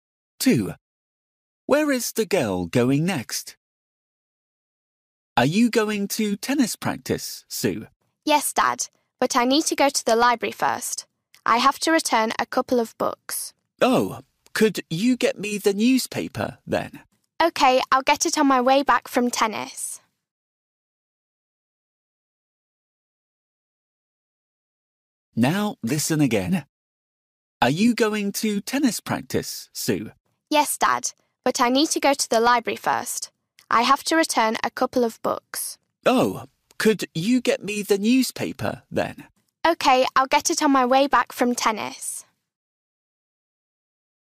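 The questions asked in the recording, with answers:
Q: Where is the girl going next?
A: the library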